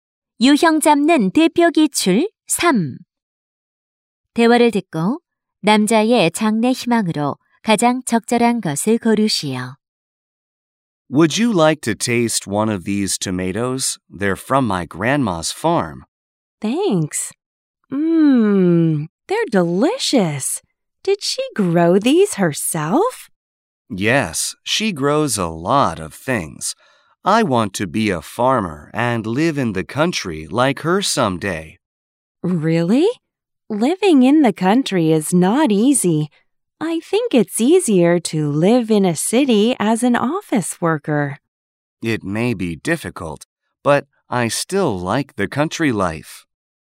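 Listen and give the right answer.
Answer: 농부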